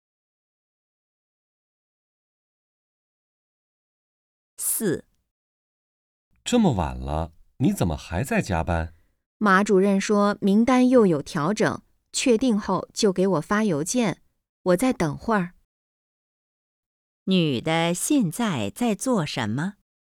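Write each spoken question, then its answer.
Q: 女的现在在做什么?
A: 加班等邮件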